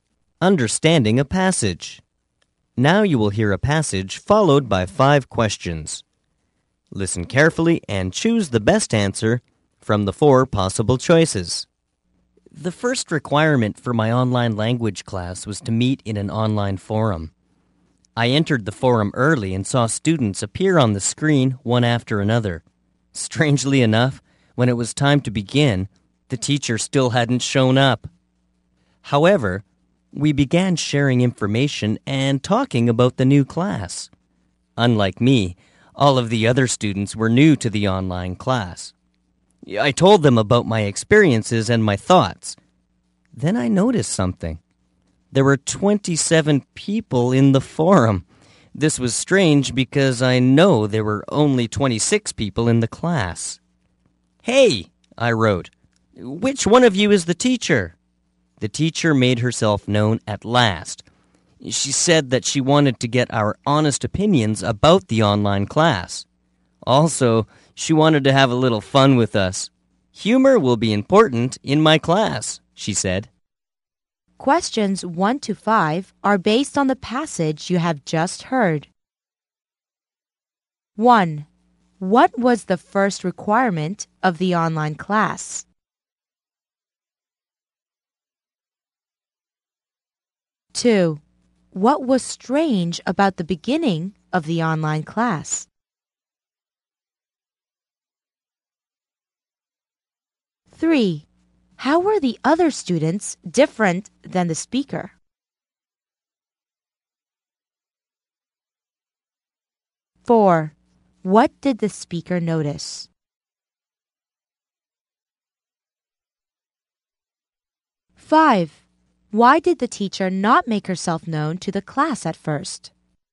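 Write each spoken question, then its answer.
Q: What was the first requirement of the online class?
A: To meet in an online forum.

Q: What was strange about the beginning of the online class?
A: The teacher hadn't shown up.

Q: How were the other students different than the speaker?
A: They were new to the online class.

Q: What did the speaker notice?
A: There were 27 people in the forum but only 26 in the class.

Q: Why did the teacher not make herself known to the class at first?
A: She wanted honest opinions about the class and to have a little fun.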